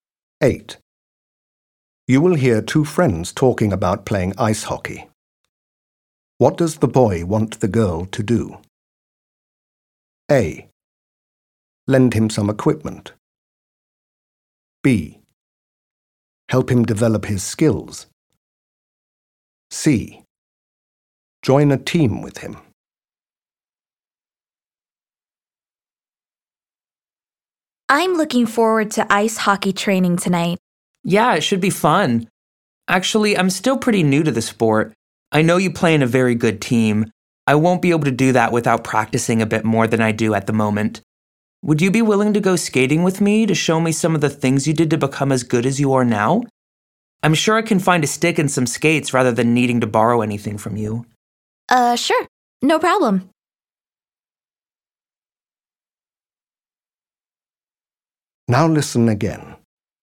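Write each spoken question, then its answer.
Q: What does the boy want the girl to do?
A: B: Help him develop his skills.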